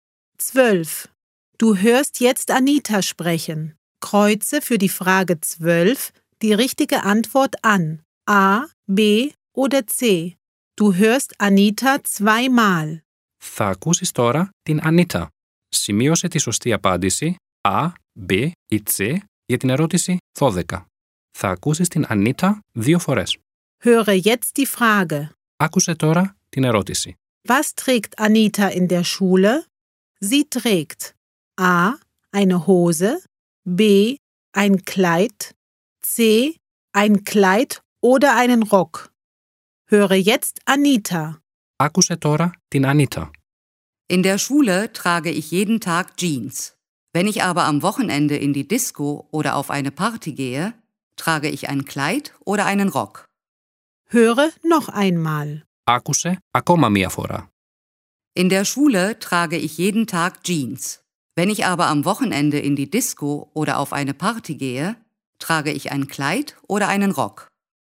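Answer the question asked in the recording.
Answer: A: Eine Hose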